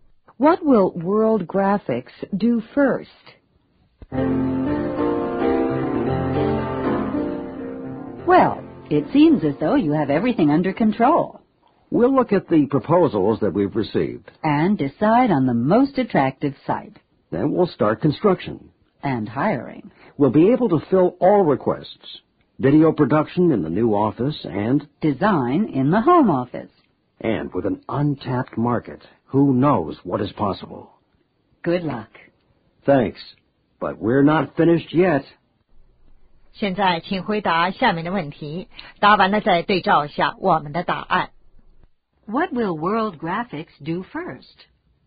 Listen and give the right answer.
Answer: Select the site.